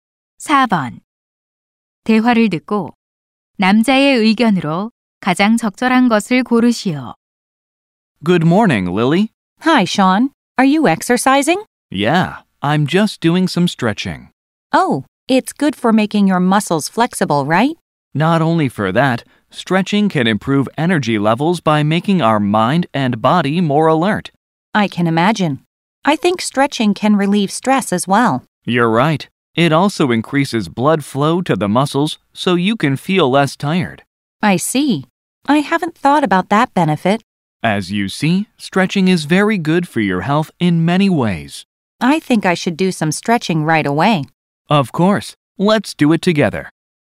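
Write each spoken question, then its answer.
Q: 대화를 듣고 남자의 의견으로 가장 적절한 것을 고르시오.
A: 스트레칭은 여러 면에서 건강에 좋다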